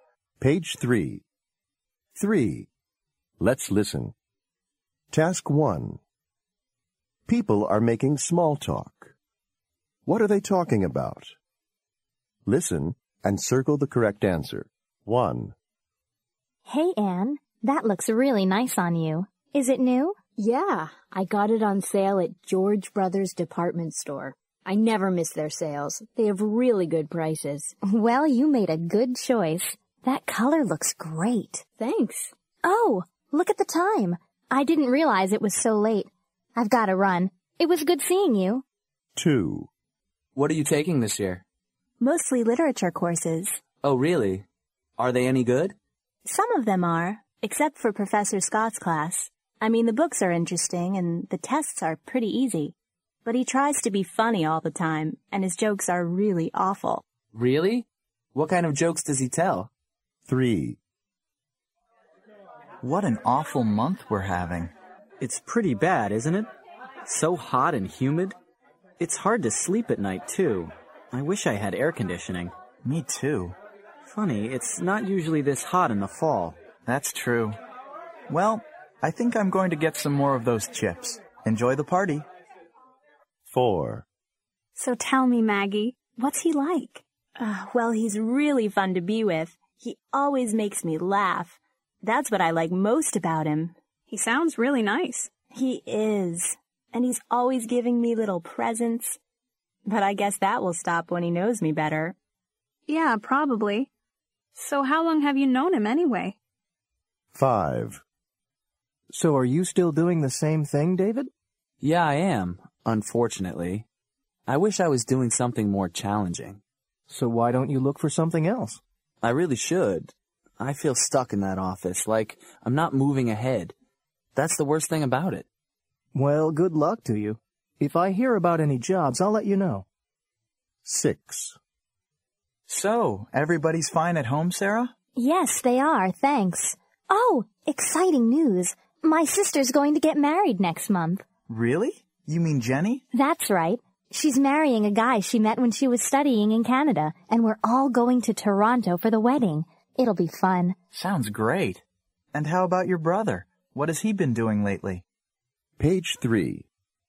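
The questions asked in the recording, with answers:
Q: What are they talking about?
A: Clothes (a new outfit)

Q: What are they talking about?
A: Classes / a professor

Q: What are they talking about?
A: The weather

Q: What are they talking about?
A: Her boyfriend

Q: What are they talking about?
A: His job

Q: What are they talking about?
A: Her family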